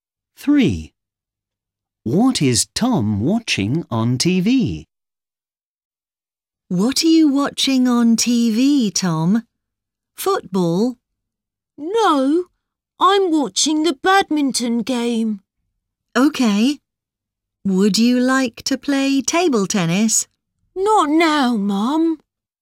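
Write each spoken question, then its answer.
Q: What is Tom watching on TV?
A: a badminton game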